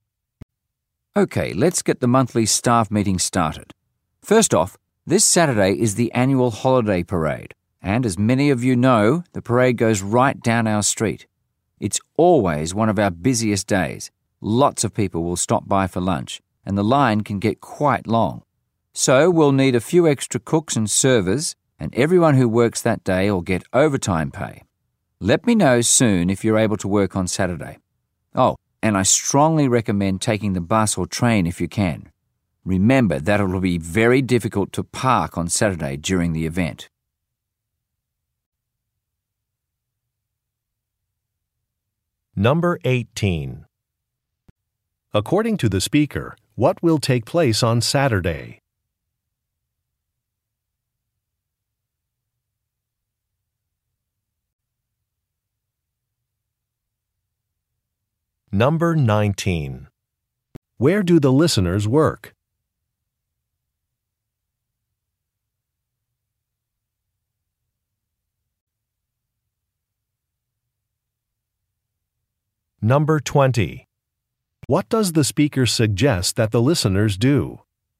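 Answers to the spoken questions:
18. An annual holiday parade
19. At a restaurant
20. Take the bus or train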